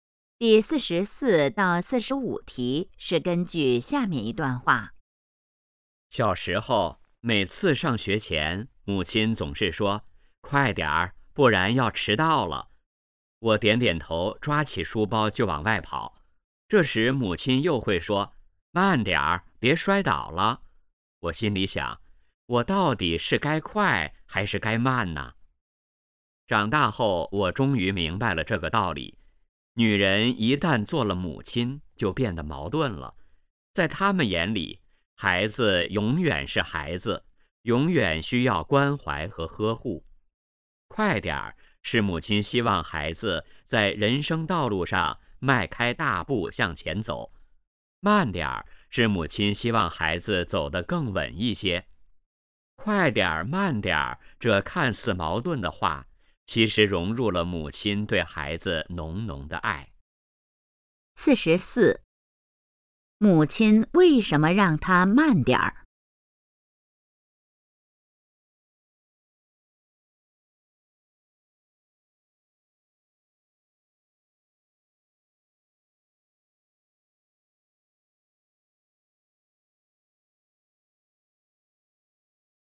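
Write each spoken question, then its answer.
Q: 母亲为什么让他慢点儿?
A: 希望孩子走得更稳,别摔倒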